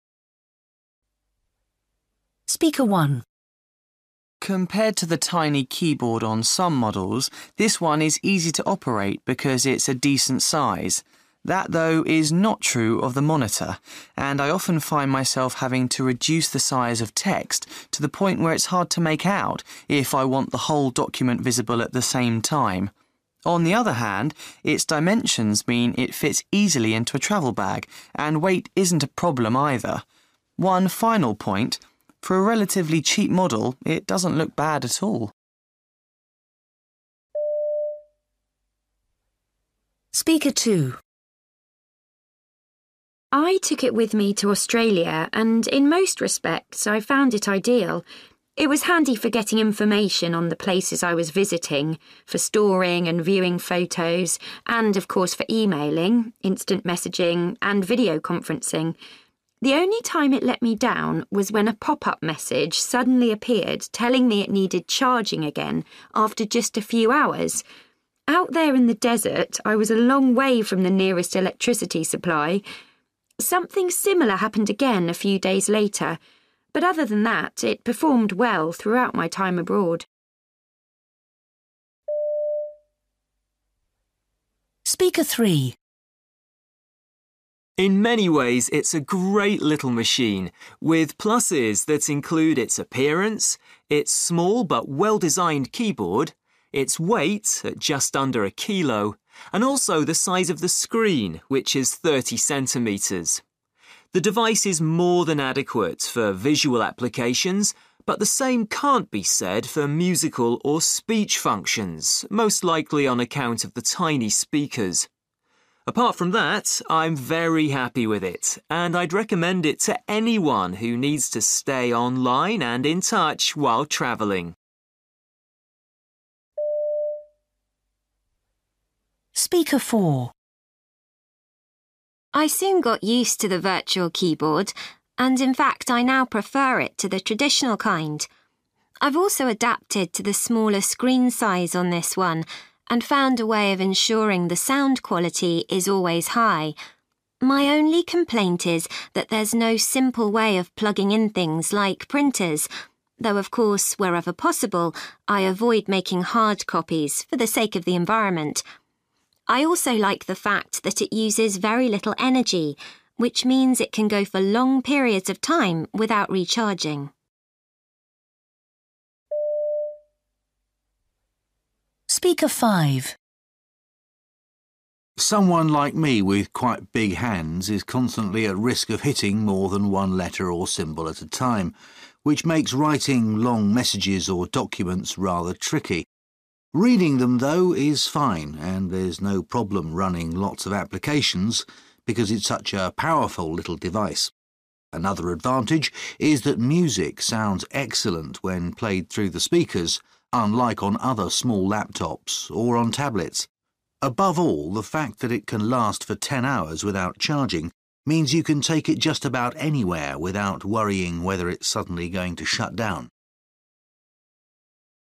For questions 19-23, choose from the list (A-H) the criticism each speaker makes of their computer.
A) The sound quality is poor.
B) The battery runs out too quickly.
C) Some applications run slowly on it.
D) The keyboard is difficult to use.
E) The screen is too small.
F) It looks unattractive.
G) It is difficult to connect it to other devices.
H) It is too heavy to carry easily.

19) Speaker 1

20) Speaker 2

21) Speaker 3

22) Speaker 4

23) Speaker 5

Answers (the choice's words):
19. The screen is too small.
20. The battery runs out too quickly.
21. The sound quality is poor.
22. It is difficult to connect it to other devices.
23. The keyboard is difficult to use.

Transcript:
Compared to the tiny keyboard on some models, this one is easy to operate because it's a decent size. That, though, is not true of the monitor, and I often find myself having to reduce the size of text to the point where it's hard to make out if I want the whole document visible at the same time. On the other hand, its dimensions mean it fts easily into a travel bag, and weight isn't a problem either. One final point: for a relatively cheap model, it doesn't look bad at all.
I took it with me to Australia and in most respects I found it ideal. It was handy for getting information on the places I was visiting, for storing and viewing photos, and of course for emailing, instant messaging and video conferencing. The only time it let me down was when a pop-up message suddenly appeared telling me it needing charging again after just a few hours. Out there in the desert I was a long way from the nearest electricity supply. Something similar happened again a few days later, but other than that it performed well throughout my time abroad.
In many ways it's a great little machine, with pluses that include its appearance, its small but well-designed keyboard, its weight – at just under a kilo – and also the size of the screen, which is 30 centimetres. The device is more than adequate for visual applications, but the same can't be said for musical or speech functions, most likely on account of the tiny speakers. Apart from that I'm very happy with it, and I'd recommend it to anyone who needs to stay online and in touch while travelling.
I soon got used to the virtual keyboard, and in fact I now prefer it to the traditional kind. I've also adapted to the smaller screen size on this one, and found a way of ensuring the sound quality is always high. My only complaint is that there's no simple way of plugging in things like printers, though of course wherever possible I avoid making hard copies for the sake of the environment. I also like the fact that it uses very little energy, which means it can go for long periods of time without recharging.
Someone like me with quite big hands is constantly at risk of hitting more than one letter or symbol at a time, which makes writing long messages or documents rather tricky. Reading them, though, is fine, and there's no problem running lots of applications because it's such a powerful little device. Another advantage is that music sounds excellent when played through the speakers, unlike on other small laptops, or on tablets. Above all, the fact that it can last for ten hours without charging means you can take it just about anywhere without worrying whether it's suddenly going to shut down.